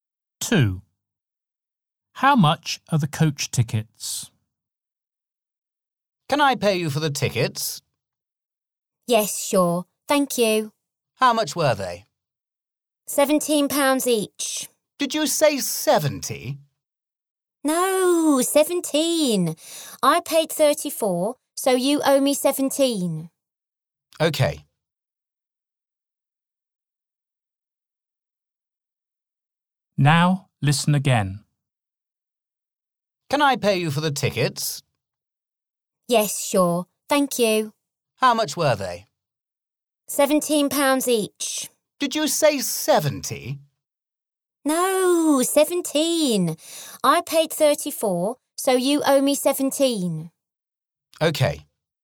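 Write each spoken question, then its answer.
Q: How much are the coach tickets?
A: £17 each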